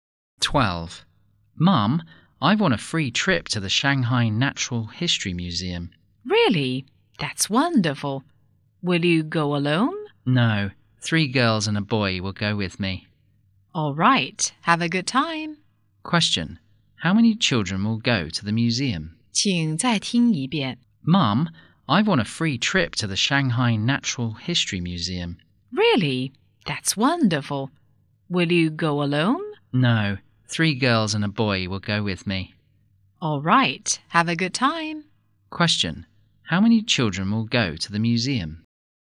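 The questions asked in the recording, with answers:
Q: How many children will go to the museum?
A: Five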